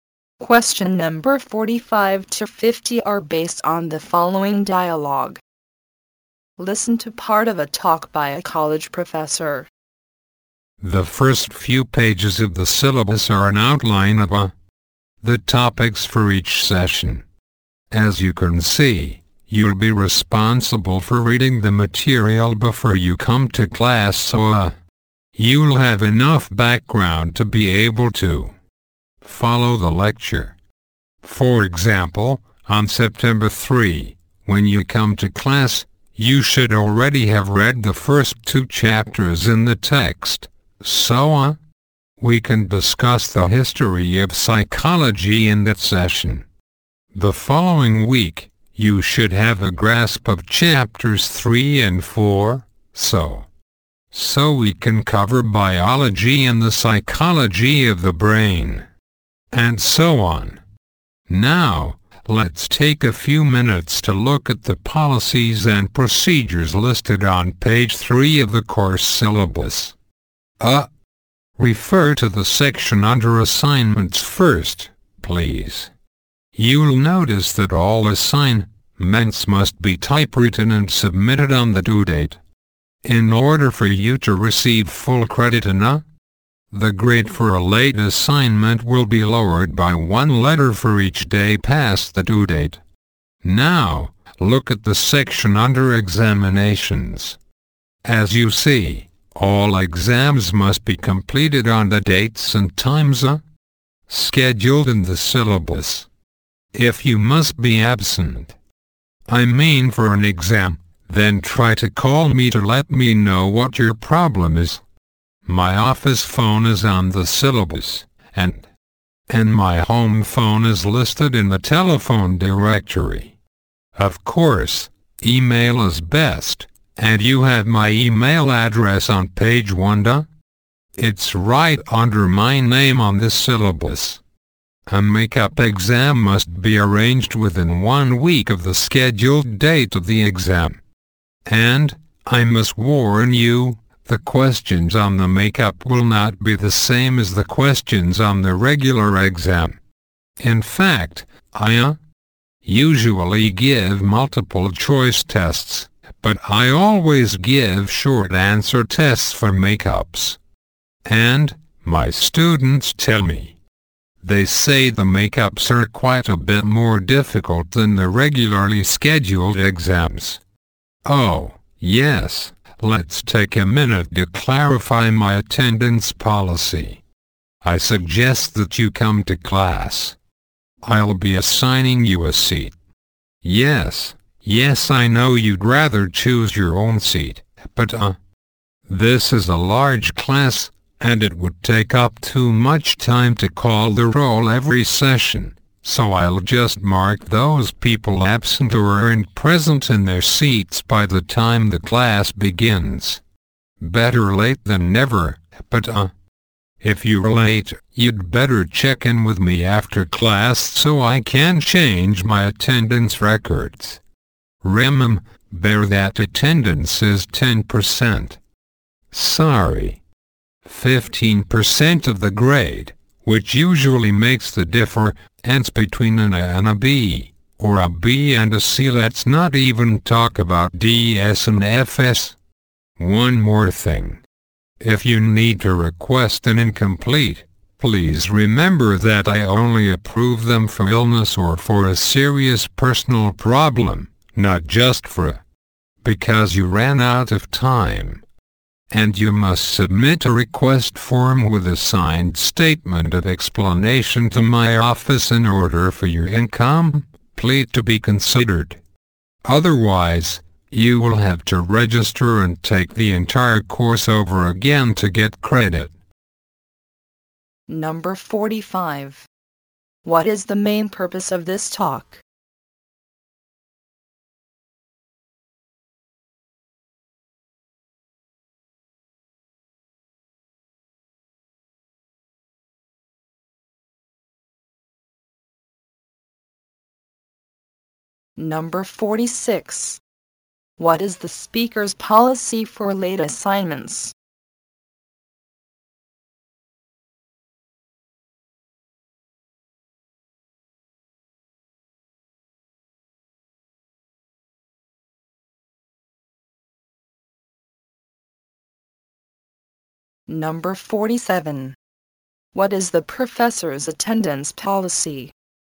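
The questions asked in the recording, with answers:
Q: What is the speaker's policy for late assignments?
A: The grade is lowered one letter for each day late.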